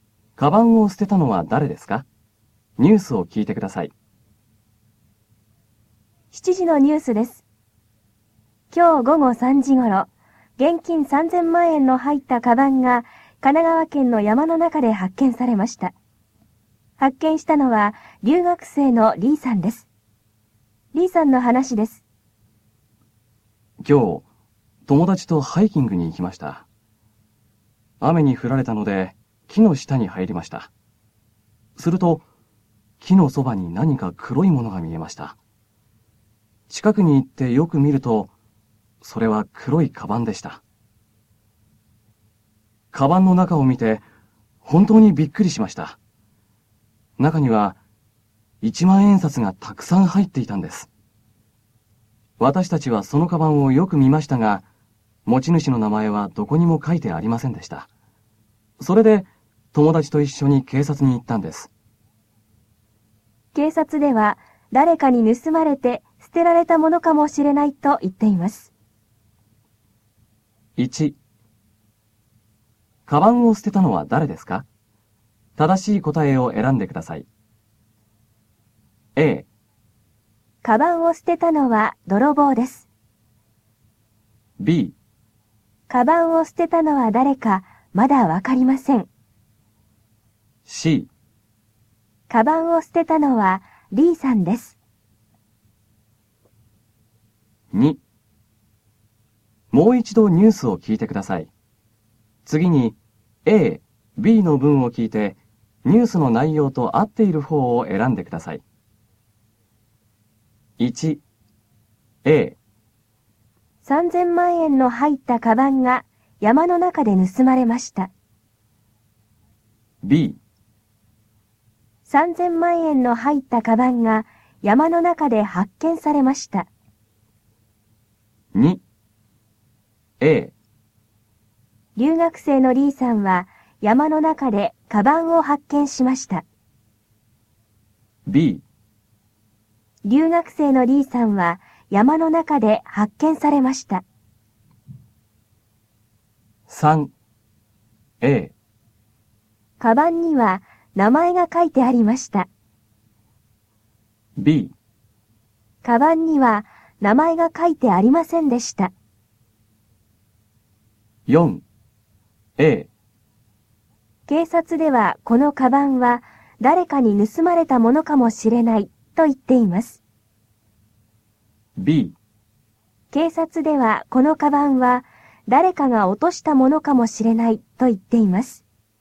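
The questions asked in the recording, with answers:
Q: カバンを捨てたのは誰ですか?正しい答えを選んでください。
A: B: カバンを捨てたのは誰かまだわかりません。

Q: 3000万円の入ったカバンが山の中で発見されました。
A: B: 3000万円の入ったカバンが山の中で発見されました。

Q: 留学生のリーさんは山の中でカバンを発見しました。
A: A: 留学生のリーさんは山の中でカバンを発見しました。

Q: カバンには名前が書いてありませんでした。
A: B: カバンには名前が書いてありませんでした。

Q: 警察ではこのカバンは誰かに盗まれたものかもしれないと言っています。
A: A: 警察ではこのカバンは誰かに盗まれたものかもしれないと言っています。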